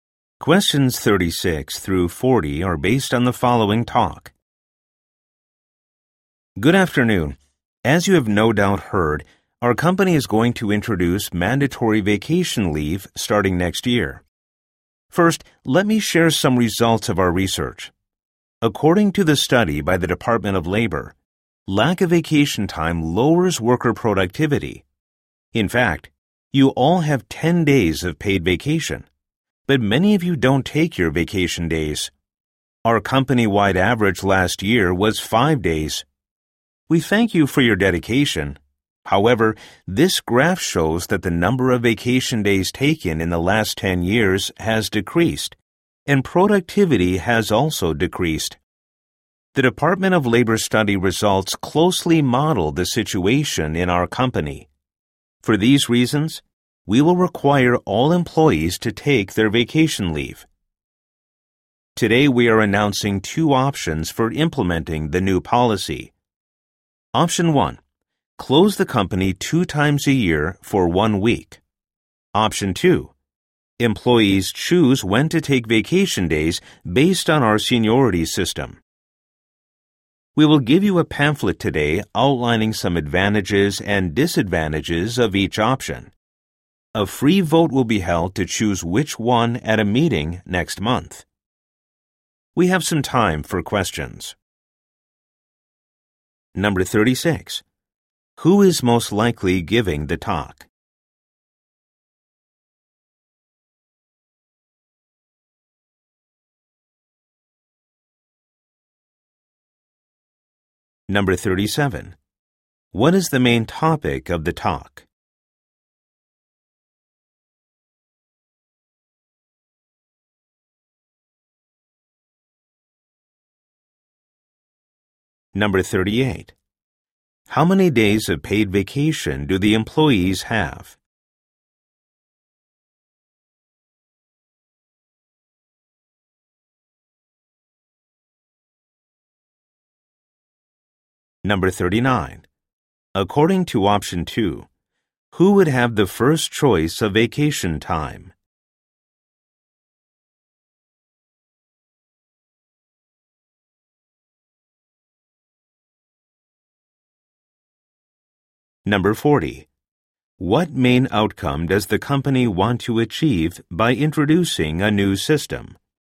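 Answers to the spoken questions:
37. Introducing mandatory vacation leave
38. 10 days
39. The most senior employees
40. Higher worker productivity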